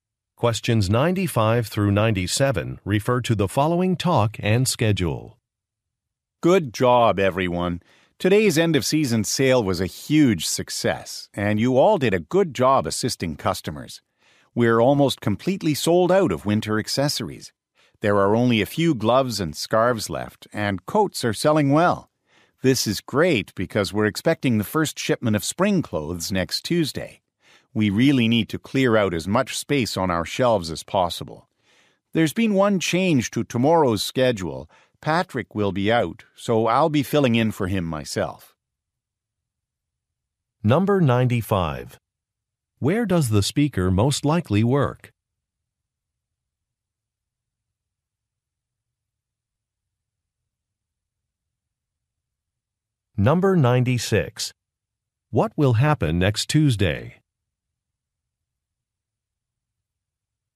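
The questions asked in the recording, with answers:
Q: Where does the speaker most likely work?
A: In a clothing store

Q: What will happen next Tuesday?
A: The first shipment of spring clothes will arrive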